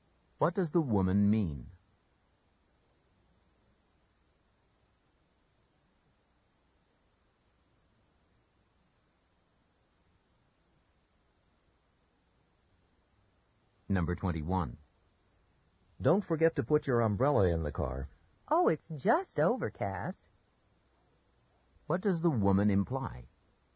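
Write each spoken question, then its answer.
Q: What does the woman imply?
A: She doesn't need an umbrella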